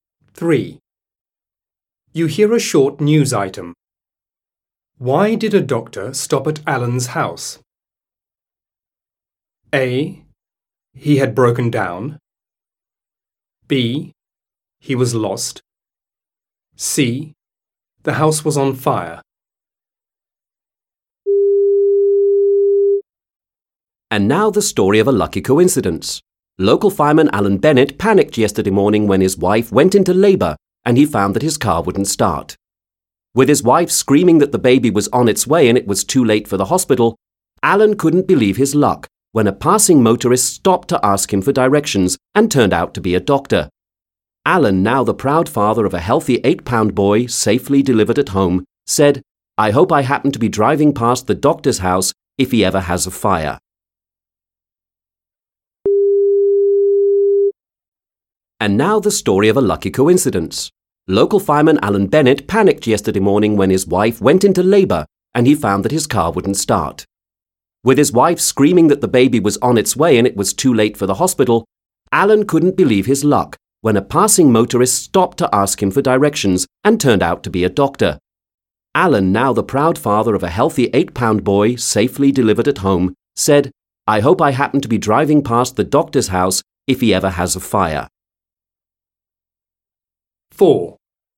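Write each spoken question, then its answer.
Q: Why did a doctor stop at Alan's house?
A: B: He was lost.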